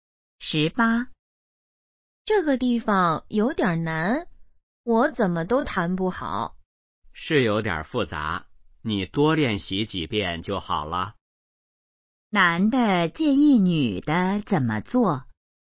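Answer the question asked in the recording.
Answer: 多练习几遍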